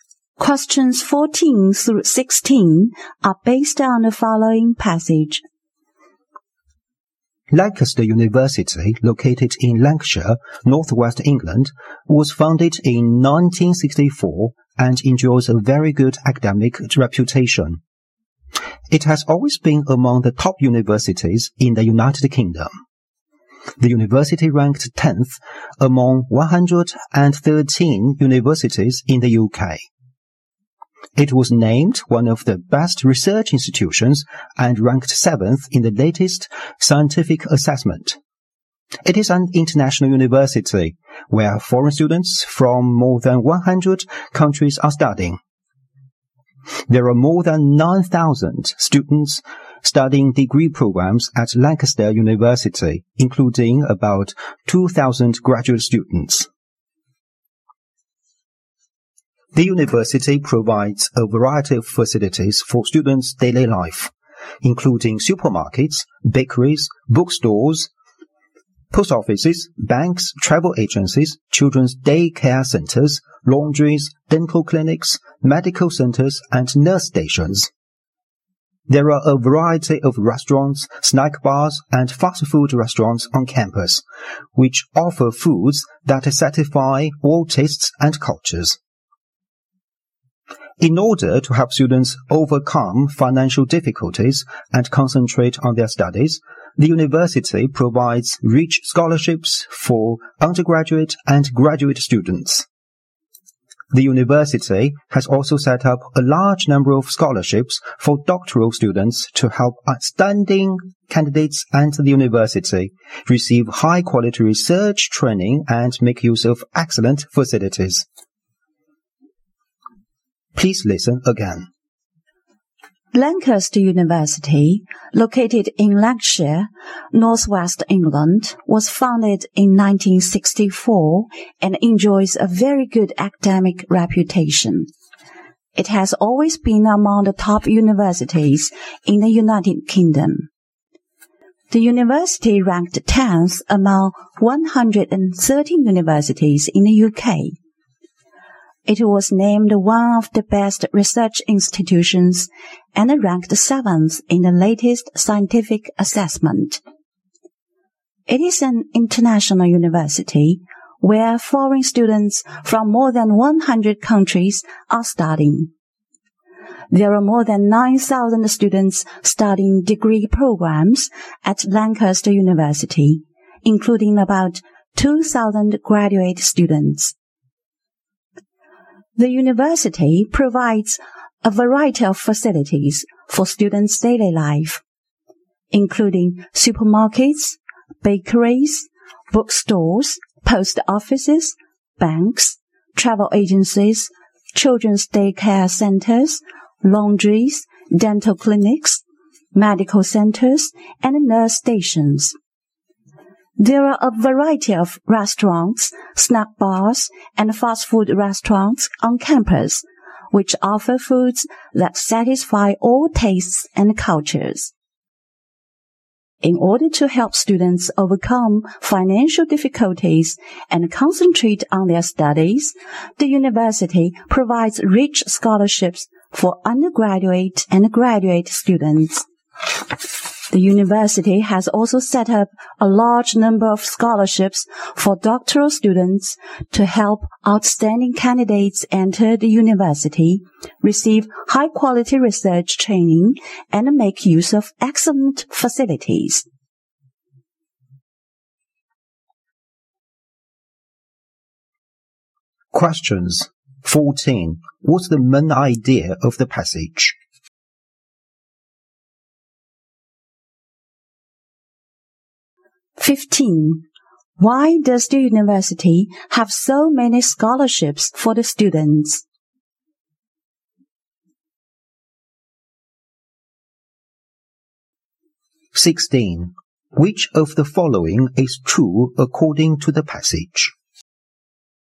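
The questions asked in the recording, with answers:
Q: What's the main idea of the passage?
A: An introduction to Lancaster University

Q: Why does the university have so many scholarships for the students?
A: To help students overcome financial difficulties and concentrate on their studies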